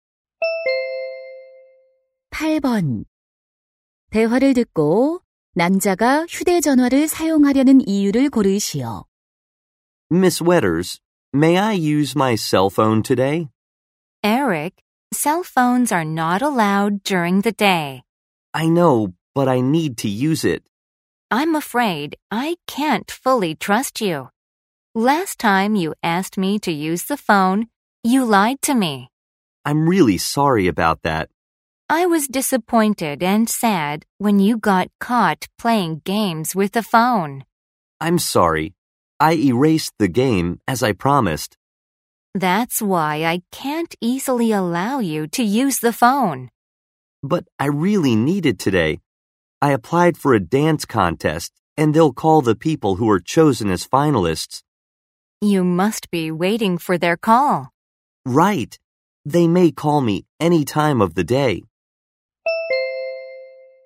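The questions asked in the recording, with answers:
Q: 대화를 듣고 남자가 휴대전화를 사용하려는 이유를 고르시오.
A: 댄스 대회 결선 진출자 발표 전화를 기다려서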